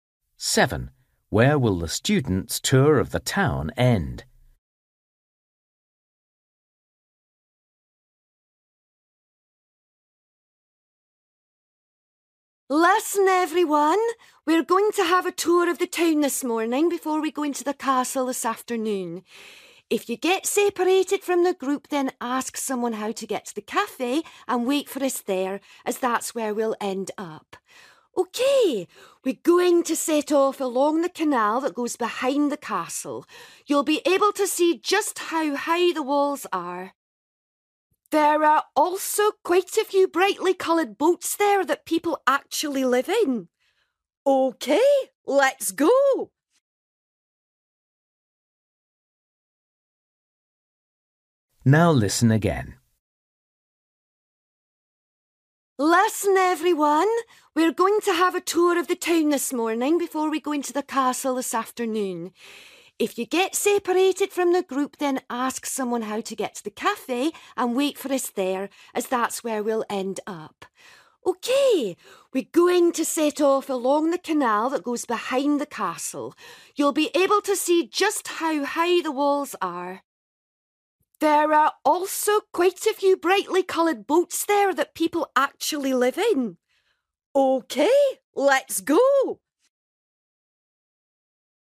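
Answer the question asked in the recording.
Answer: At the cafe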